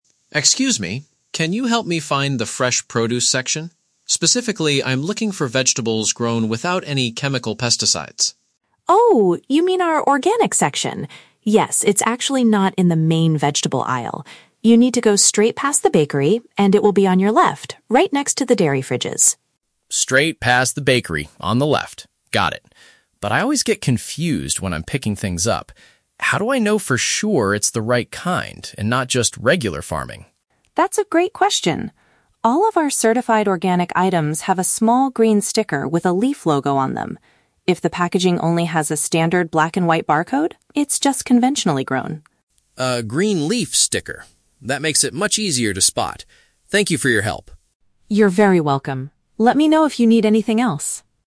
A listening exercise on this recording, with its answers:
Listen to a conversation between a shopper and a supermarket employee. For each question, choose the correct answer (A, B, or C).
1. What exactly is the customer trying to find in the supermarket?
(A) Freshly made bread and sweet pastries.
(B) Plant foods grown without harmful chemicals.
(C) A specific brand of healthy milk and cheese.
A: Plant foods grown without harmful chemicals.

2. Where should the customer go to find these specific products?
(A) To the main produce aisle at the front of the store.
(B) Inside the bakery department, on the left side.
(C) Just beyond the bread area, beside the milk coolers.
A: Just beyond the bread area, beside the milk coolers.

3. How can the customer identify the organic items?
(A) By finding a coloured label featuring a plant part.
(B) By looking for a standard black and white barcode.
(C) By asking the manager of the fresh produce section.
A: By finding a coloured label featuring a plant part.

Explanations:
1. The customer asks for "vegetables grown without any chemical pesticides," which means plant foods grown without harmful chemicals. Option (A) is a trap; the bakery is mentioned as a landmark, but the customer is not looking for bread. Option (C) is a trap; "dairy fridges" are mentioned as a location marker, but the customer is not buying milk.
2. The employee tells the customer to go "past the bakery" (beyond the bread area) and it's "right next to the dairy fridges" (beside the milk coolers). Option (A) is a trap; the employee explicitly says it is "not in the main vegetable aisle." Option (B) is a trap; the customer must walk past the bakery, not inside it.
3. The employee states that organic items have a "small green sticker with a leaf logo" (a coloured label featuring a plant part). Option (B) is a trap; the employee mentions a "black and white barcode," but explains that this is for conventionally grown (regular) food, not organic. Option (C) is not mentioned.

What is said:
Customer: Excuse me. Can you help me find the fresh produce section? Specifically, I'm looking for vegetables grown without any chemical pesticides.
Employee: Oh, you mean our organic section! Yes, it's actually not in the main vegetable aisle. You need to go straight past the bakery, and it will be on your left, right next to the dairy fridges.
Customer: Straight past the bakery, on the left. Got it. But I always get confused when I'm picking things up. How do I know for sure it's the right kind and not just regular farming?
Employee: That's a great question. All of our certified organic items have a small green sticker with a leaf logo on them. If the packaging only has a standard black and white barcode, it's just conventionally grown.
Customer: A green leaf sticker. That makes it much easier to spot. Thank you for your help!

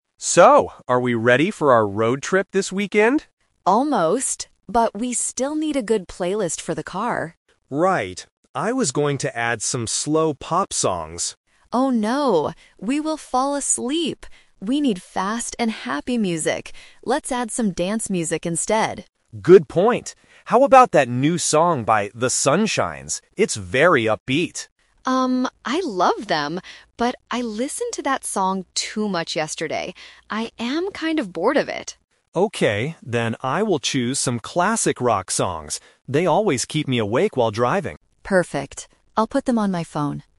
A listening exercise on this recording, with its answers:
Listen to the conversation between two friends. Choose the correct answer (A, B, or C) for each question.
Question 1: What kind of music does the woman want for the trip?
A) Slow pop songs.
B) Fast dance music.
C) Classical music.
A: Fast dance music.

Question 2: Why does the woman say no to the song by "The Sunshines"?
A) Because the song is too slow.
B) Because she doesn't like the band.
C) Because she played it too many times already.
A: Because she played it too many times already.

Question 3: What music will they finally listen to in the car?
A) Classic rock songs.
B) New pop songs.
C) Dance songs by "The Sunshines".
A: Classic rock songs.

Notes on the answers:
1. The woman explicitly says, "We need fast and happy music. Let's add some dance music instead." Option (A) is a trap because the man originally wanted to add slow pop songs, but the woman rejected the idea. Option (C) is a distractor using a word similar to "classic rock," which is mentioned later.
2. The woman says, "I listened to that song too much yesterday. I am kind of bored of it." Option (A) is incorrect because the man actually describes the song as "upbeat" (fast). Option (B) is a trap because she clearly states, "I love them," meaning she likes the band, just not that specific song right now.
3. After rejecting the other ideas, the man suggests, "I will choose some classic rock songs," and the woman agrees by saying, "Perfect!" Option (B) is a trap combining "new" and "pop," which were mentioned earlier but not chosen. Option (C) is a trap because the woman already rejected the song by "The Sunshines".

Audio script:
Man: So, are we ready for our road trip this weekend?
Woman: Almost! But we still need a good playlist for the car.
Man: Right. I was going to add some slow pop songs...
Woman: Oh, no. We will fall asleep! We need fast and happy music. Let's add some dance music instead.
Man: Good point. How about that new song by "The Sunshines"? It's very upbeat.
Woman: Um, I love them, but I listened to that song too much yesterday. I am kind of bored of it.
Man: Okay, then I will choose some classic rock songs. They always keep me awake while driving.

